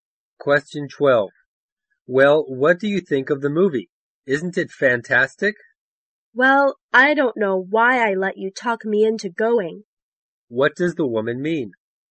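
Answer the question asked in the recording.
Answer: She didn't like the movie and regrets going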